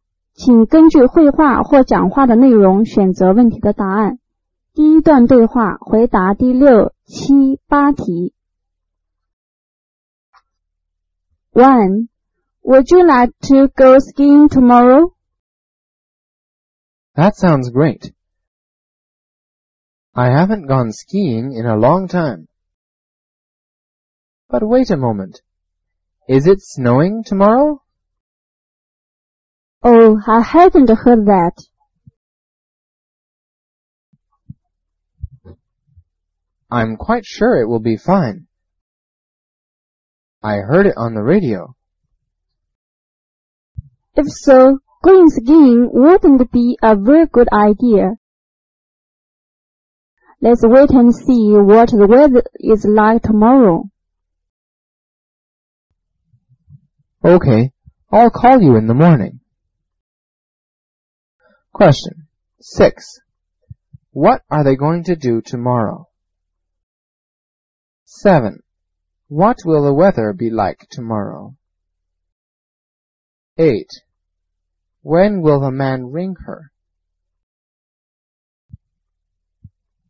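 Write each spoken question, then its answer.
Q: When will the man ring her?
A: In the morning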